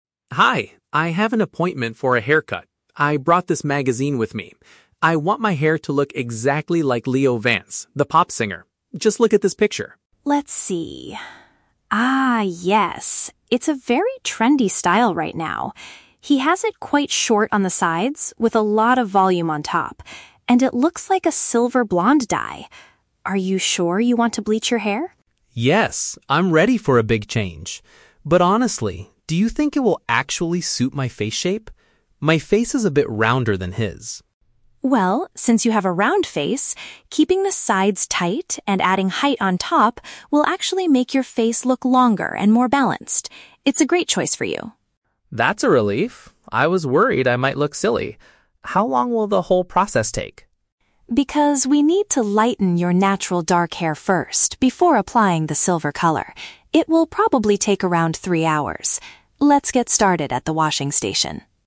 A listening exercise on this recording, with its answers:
Listen to a conversation between a customer and a hairstylist. Choose the correct answer (A, B, or C) for each question.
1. What does the customer want the stylist to do?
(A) Recommend a new style that makes his face look rounder.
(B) Copy a hairstyle he saw on a famous musician.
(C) Give him a traditional, easy-to-manage haircut.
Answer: (B) Copy a hairstyle he saw on a famous musician.

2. What is the stylist's professional opinion about the chosen hairstyle?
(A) She believes it will flatter the customer's facial features.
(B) She feels the sides are too short for his specific face shape.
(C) She thinks the silver color will severely damage his hair.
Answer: (A) She believes it will flatter the customer's facial features.

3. Why will the salon visit take a few hours?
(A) Because the stylist needs to wash his hair multiple times.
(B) Because the salon is very busy with other appointments today.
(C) Because they have to remove his dark hair color before dyeing it.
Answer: (C) Because they have to remove his dark hair color before dyeing it.

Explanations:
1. The customer says, "I want my hair to look exactly like Leo Vance, the pop singer" (which paraphrases to copying a hairstyle he saw on a famous musician). Why the traps are wrong: (A) is a trap. The customer mentions his face is round, but the style will make it look longer, not rounder. (C) is a plausible request at a salon, but the customer explicitly says he is "ready for a big change" and wants a "trendy" celebrity style.
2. The stylist says the cut will "make your face look longer and more balanced. It's a great choice for you" (which means she believes it will flatter his facial features). Why the traps are wrong: (B) is a trap. The stylist says "keeping the sides tight" (short) is actually what helps his face shape, not that it's a bad thing. (C) is a trap. She asks if he is sure he wants to "bleach" (lighten) his hair, but she never says it will severely damage it.
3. The stylist explains it will take three hours because they "need to lighten your natural dark hair first before applying the silver color" (which paraphrases to removing his dark hair color before dyeing it). Why the traps are wrong: (A) is a trap. She mentions the "washing station" at the very end, but washing is not the reason the process takes three hours. (B) is a plausible reason for a delay at a salon, but the audio never mentions the salon being busy.

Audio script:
Customer: Hi, I have an appointment for a haircut. I brought this magazine with me. I want my hair to look exactly like Leo Vance, the pop singer. Just look at this picture.
Stylist: Let's see. Ah, yes. It's a very trendy style right now. He has it quite short on the sides, with a lot of volume on top. And it looks like a silver-blonde dye. Are you sure you want to bleach your hair?
Customer: Yes, I'm ready for a big change. But honestly, do you think it will actually suit my face shape? My face is a bit rounder than his.
Stylist: Well, since you have a round face, keeping the sides tight and adding height on top will actually make your face look longer and more balanced. It's a great choice for you.
Customer: That's a relief! I was worried I might look silly. How long will the whole process take?
Stylist: Because we need to lighten your natural dark hair first before applying the silver color, it will probably take around three hours.

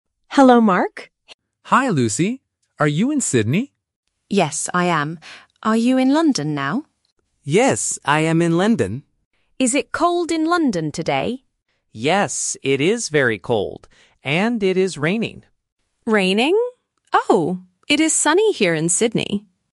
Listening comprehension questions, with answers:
Listen to the telephone conversation. Circle the correct answer (A, B, or C).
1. Where is Mark right now?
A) In Sydney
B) In London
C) In New York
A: B) In London

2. What is the weather like in London?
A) Raining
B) Sunny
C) Snowy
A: A) Raining

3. What is the weather like in Sydney?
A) Sunny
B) Cold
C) Cloudy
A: A) Sunny

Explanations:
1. The Key: Mark says "Yes" when Lucy asks if he is in London, and then he says it: "I am in London." The Trap: Option (A) "Sydney" is mentioned in the audio, but that is where Lucy is, not Mark. Not Mentioned: Option (C) "New York" is completely new information.
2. The Key: Mark clearly says about London: "Yes, it is very cold. And it is raining." The Trap: Option (B) "Sunny" is a weather word used in the conversation, but it describes Sydney, not London. Not Mentioned: Option (C) "Snowy" is never mentioned.
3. The Key: Lucy says clearly at the end: "It is sunny here in Sydney." The Trap: Option (B) "Cold" is mentioned, but it describes Mark's city (London), not Lucy's city. Not Mentioned: Option (C) "Cloudy" is not in the audio.

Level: A1

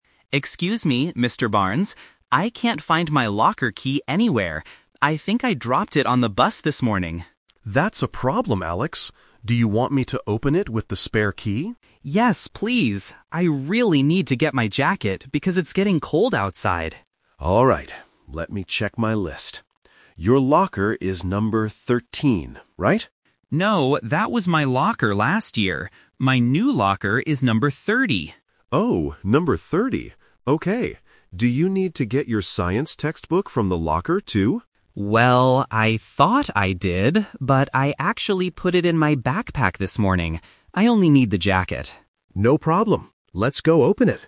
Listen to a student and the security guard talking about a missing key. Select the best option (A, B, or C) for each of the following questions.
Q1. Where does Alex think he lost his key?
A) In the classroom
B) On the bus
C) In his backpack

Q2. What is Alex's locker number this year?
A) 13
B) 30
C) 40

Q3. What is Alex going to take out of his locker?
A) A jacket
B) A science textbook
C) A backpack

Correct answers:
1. B) On the bus
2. B) 30
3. A) A jacket

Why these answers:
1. Alex clearly says at the beginning, "I think I dropped it on the bus this morning." Why the traps are wrong: Option (C) is a "Detail Trap". The backpack is mentioned later in the audio, but that is where he put his science book, not where he lost his key. Option (A) is a plausible place to lose a key at school, but it is never mentioned.
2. Alex corrects the guard by saying, "My new locker is number 30." Why the traps are wrong: Option (A) is "The Twist Trap". Mr. Barnes asks if his locker is 13, but Alex says that was his locker last year. Option (C) is a plausible number but is not mentioned in the audio.
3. Alex states his main reason for opening the locker: "I really need to get my jacket..." and confirms at the end, "I only need the jacket." Why the traps are wrong: Option (B) is "The Twist Trap". Mr. Barnes asks if he needs his science textbook, and Alex thought he did, but he already put it in his backpack. Option (C) is where the book is, not what he wants to take out.

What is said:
Alex: Excuse me, Mr. Barnes. I can't find my locker key anywhere. I think I dropped it on the bus this morning.
Mr. Barnes: That's a problem, Alex. Do you want me to open it with the spare key?
Alex: Yes, please. I really need to get my jacket because it's getting cold outside.
Mr. Barnes: Alright. Let me check my list. Your locker is number 13, right?
Alex: No, that was my locker last year. My new locker is number 30.
Mr. Barnes: Oh, number 30. Okay. Do you need to get your science textbook from the locker, too?
Alex: Well, I thought I did, but I actually put it in my backpack this morning. I only need the jacket.

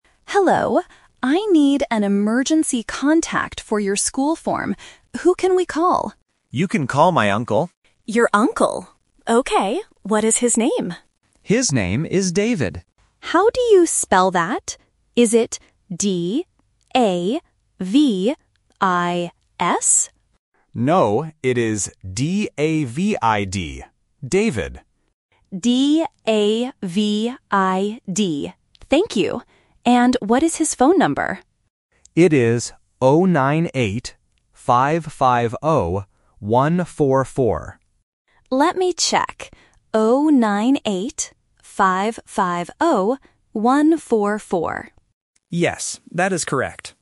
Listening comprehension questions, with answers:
Listen to the conversation between a student and an office worker. Choose the correct answer (A, B, or C) for each question.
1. Who is the emergency contact?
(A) The student's father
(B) The student's aunt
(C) The student's uncle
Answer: (C) The student's uncle

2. What is the contact's name?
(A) Davis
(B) David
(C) Daniel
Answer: (B) David

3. What is his phone number?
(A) 098 550 144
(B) 098 550 140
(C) 089 550 144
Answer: (A) 098 550 144

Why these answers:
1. The worker asks who they can call, and the student says, "You can call my uncle." Option A (father) is a common emergency contact but is not mentioned. Option B (aunt) is a trap using a different extended family member.
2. The worker asks if the name is spelled D-A-V-I-S (Option A is the trap). The student corrects the worker and spells it D-A-V-I-D. Option C (Daniel) is a plausible name but is never mentioned.
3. The student clearly says the number is "0-9-8, 5-5-0, 1-4-4." The worker also repeats this exact number. Option B (ends in 140) and Option C (starts with 089) are traps because they have numbers that look and sound very similar to the correct answer.

